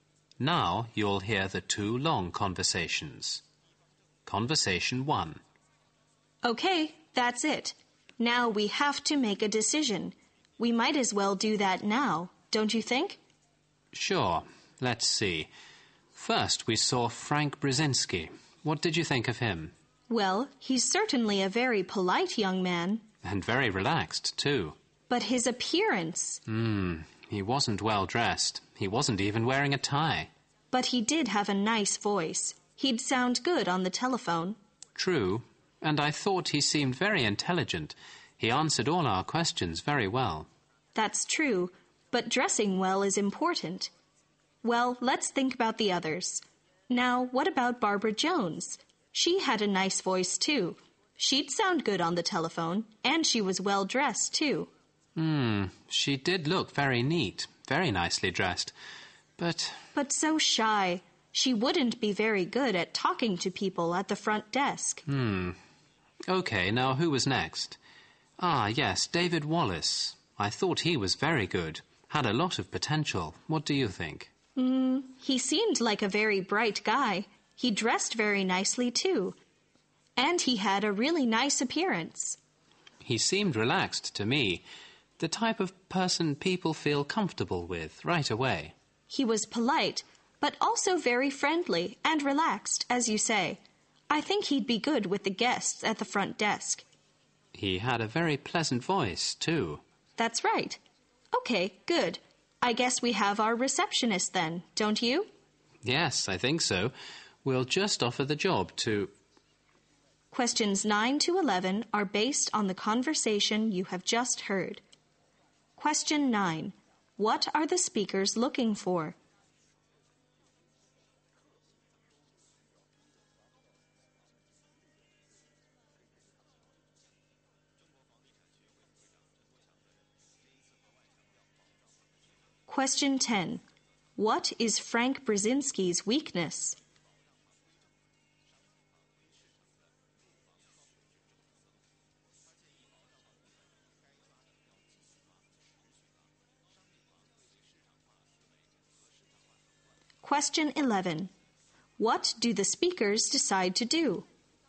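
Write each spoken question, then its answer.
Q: What are the speakers looking for?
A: A receptionist.

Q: What is Frank Brzezinski's weakness?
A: He wasn't well dressed.

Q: What do the speakers decide to do?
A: Offer the job to David Wallace.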